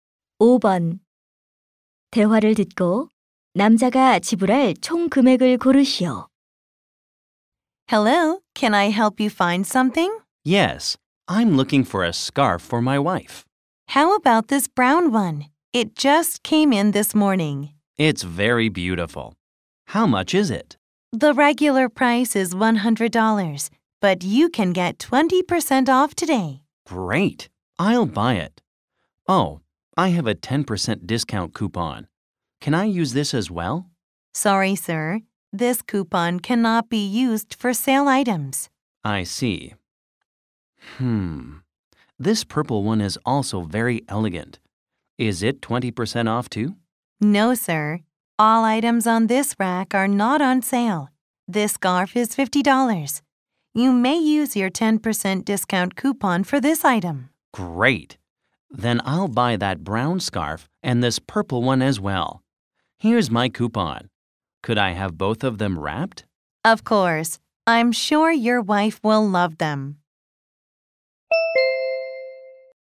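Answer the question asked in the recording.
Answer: 125달러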